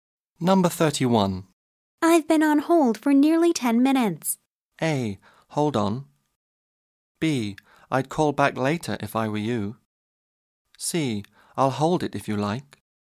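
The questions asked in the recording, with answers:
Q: I've been on hold for nearly 10 minutes.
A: B: I'd call back later if I were you.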